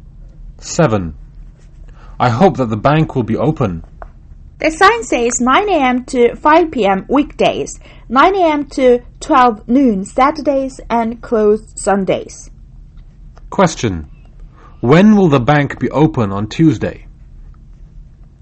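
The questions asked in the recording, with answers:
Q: When will the bank be open on Tuesday?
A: 9 a.m. to 5 p.m.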